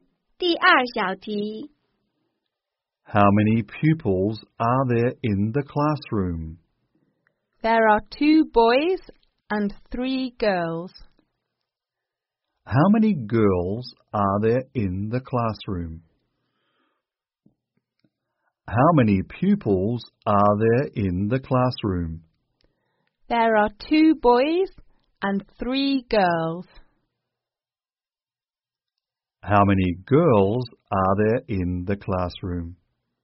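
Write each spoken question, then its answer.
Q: How many girls are there in the classroom?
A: Three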